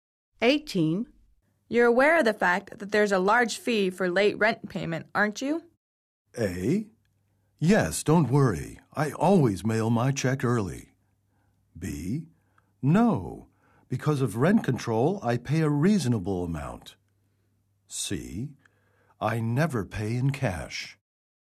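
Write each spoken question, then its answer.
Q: You're aware of the fact that there's a large fee for late rent payment, aren't you?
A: A: Yes, don't worry. I always mail my check early.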